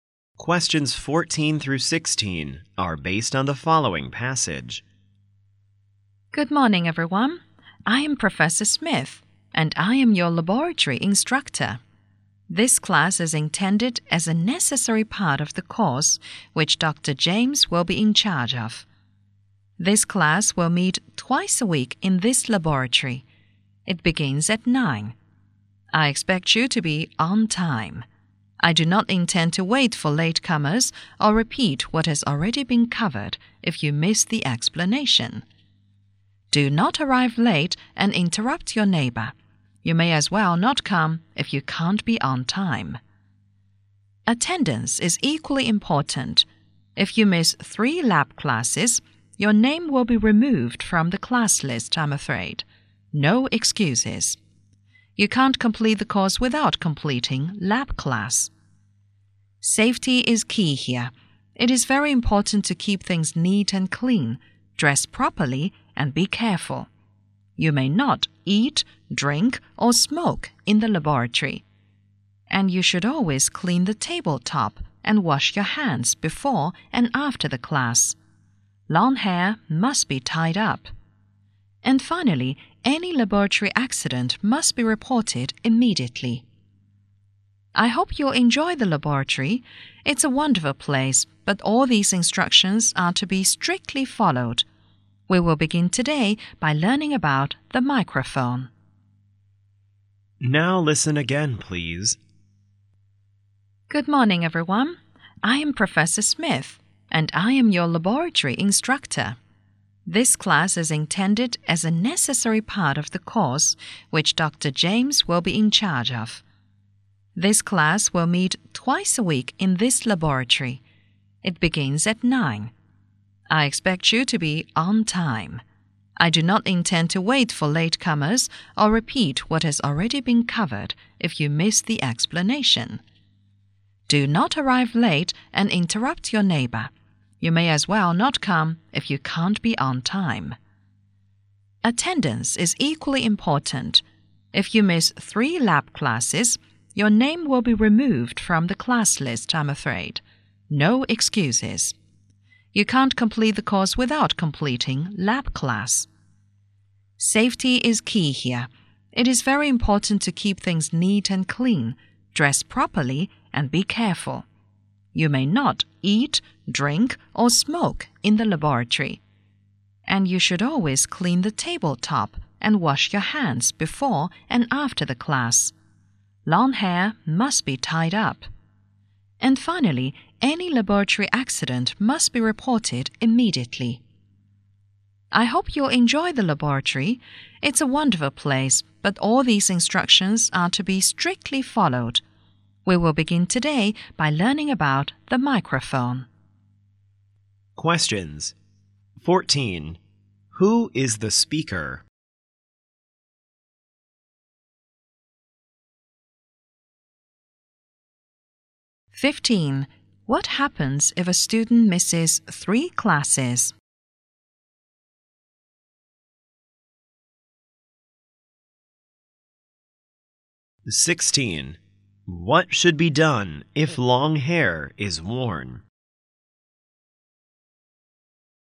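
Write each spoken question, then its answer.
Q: Who is the speaker?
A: A laboratory instructor

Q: What happens if a student misses 3 classes?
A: His or her name will be removed from the class list

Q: What should be done if long hair is worn?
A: It must be tied up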